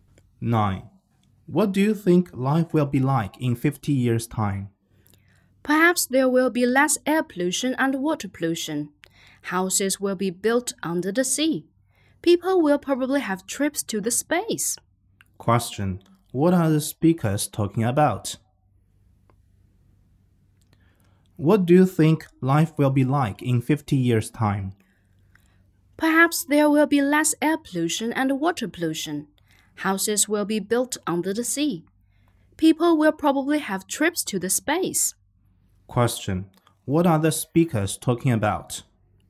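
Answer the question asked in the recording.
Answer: Life in the future (in 50 years).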